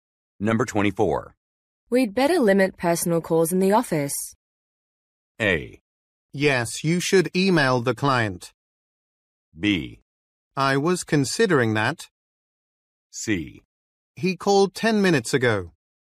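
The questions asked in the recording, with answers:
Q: We'd better limit personal calls in the office.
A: B: I was considering that.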